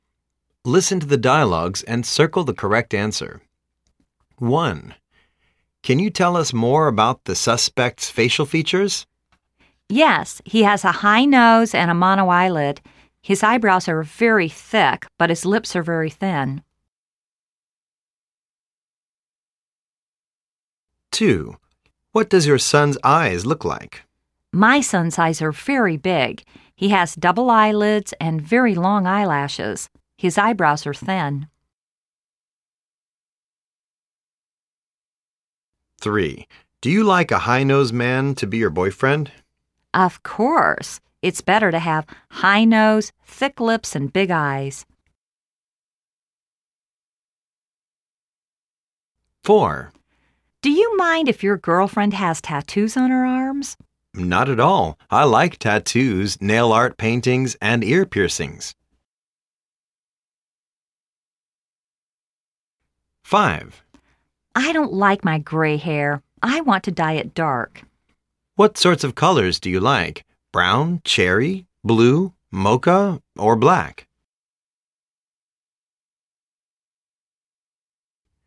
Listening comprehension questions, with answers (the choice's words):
Listen to the dialogues and circle the correct answers.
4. He likes...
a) hair dye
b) tattoos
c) nail art paintings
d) ear piercing.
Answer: tattoos